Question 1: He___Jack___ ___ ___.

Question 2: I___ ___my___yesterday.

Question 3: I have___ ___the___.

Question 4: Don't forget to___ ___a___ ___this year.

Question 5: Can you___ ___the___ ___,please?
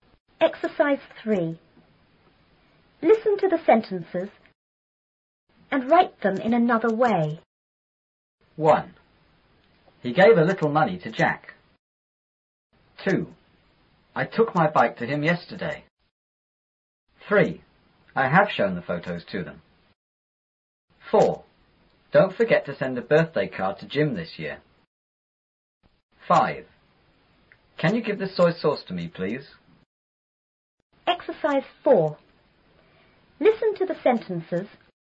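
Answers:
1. gave / a little money
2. took him / bike
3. shown them / photos
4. send Jim / birthday card
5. give me / soy sauce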